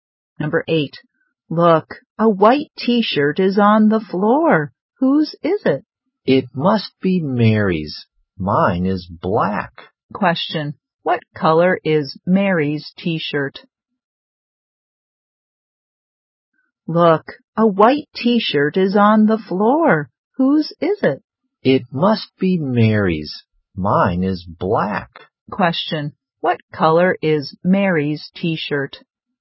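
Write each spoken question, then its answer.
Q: What color is Mary's t-shirt?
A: White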